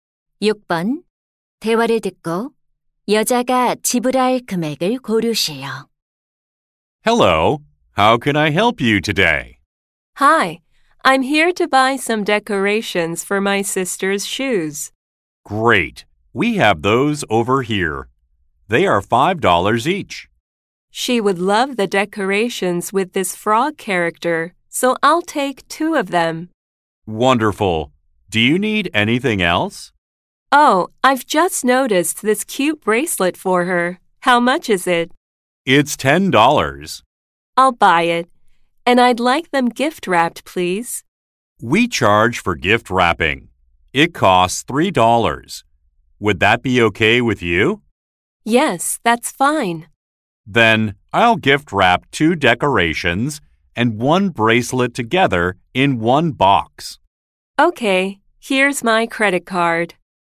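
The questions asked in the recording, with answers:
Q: 대화를 듣고 여자가 지불할 금액을 고르세요.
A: $23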